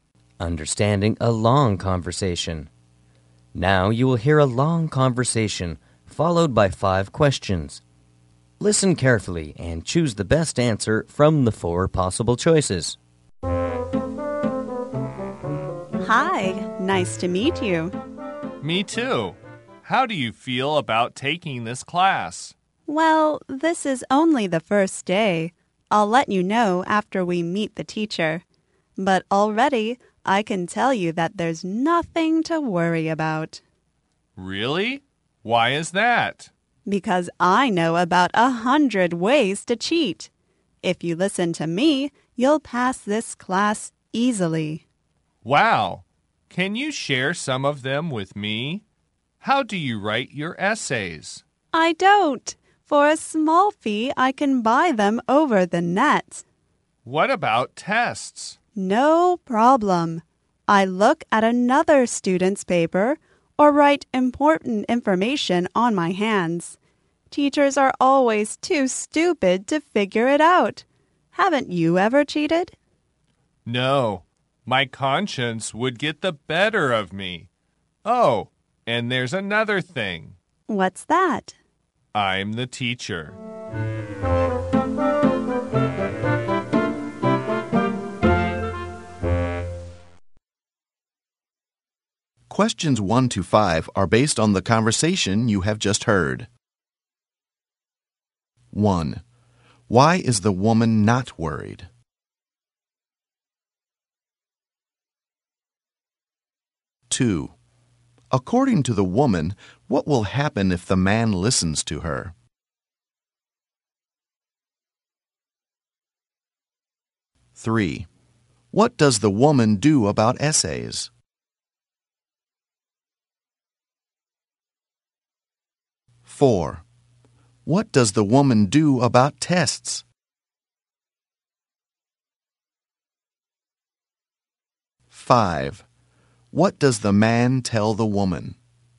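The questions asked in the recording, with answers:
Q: Why is the woman not worried?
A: She knows about 100 ways to cheat.

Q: According to the woman, what will happen if the man listens to her?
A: He will pass the class easily.

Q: What does the woman do about essays?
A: She buys them over the net for a small fee.

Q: What does the woman do about tests?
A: She looks at another student's paper or writes information on her hands.

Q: What does the man tell the woman?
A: That he is the teacher.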